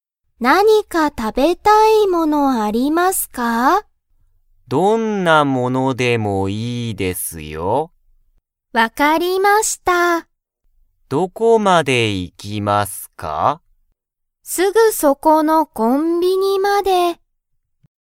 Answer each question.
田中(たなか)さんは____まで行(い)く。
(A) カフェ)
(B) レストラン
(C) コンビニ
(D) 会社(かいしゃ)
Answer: (C) コンビニ

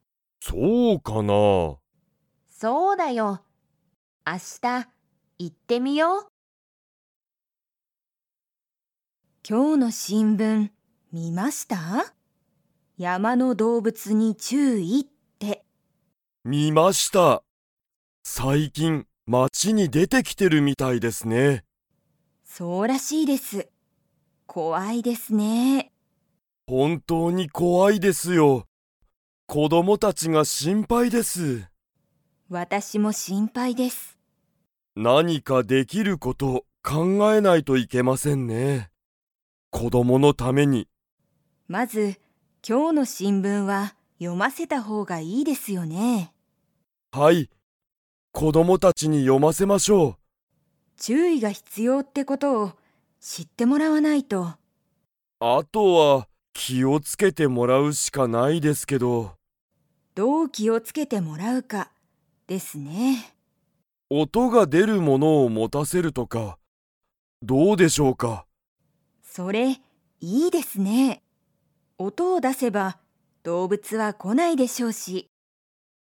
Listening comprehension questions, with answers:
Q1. 最近(さいきん)、山(やま)の動物(どうぶつ)は街(まち)に出(で)てきていますか?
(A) はい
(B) いいえ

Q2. 二人ふたりは子供こども達たちに を読よませた方ほうがいいと思おもっている。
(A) 動物どうぶつ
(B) テレビ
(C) 手紙てがみ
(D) 新聞しんぶん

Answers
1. (A) はい
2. (D) 新聞しんぶん

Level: Level 3

